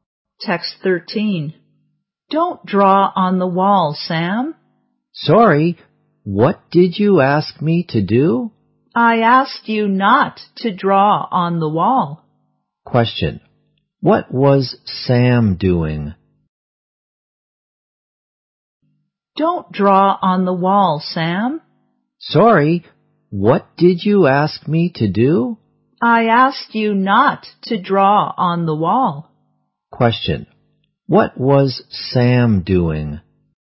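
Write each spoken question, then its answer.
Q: What was Sam doing?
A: Drawing on the wall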